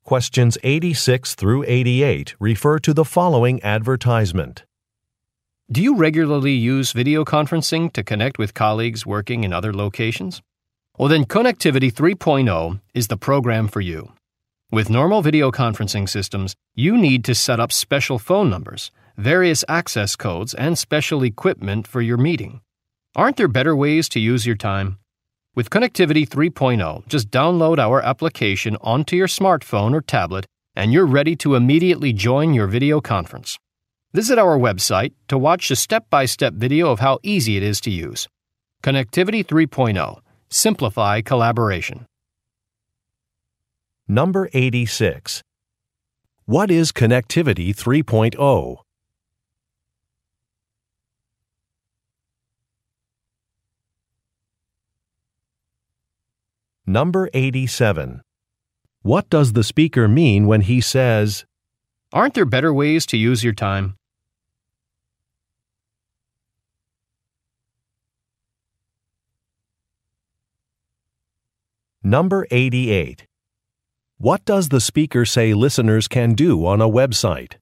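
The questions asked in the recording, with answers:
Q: What is Connectivity 3.0?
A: A video conferencing application

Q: What does the speaker mean when he says, "Aren't there better ways to use your time?"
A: Setting up normal video conferencing takes too much time

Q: What does the speaker say listeners can do on a website?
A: Watch a step-by-step video of how to use it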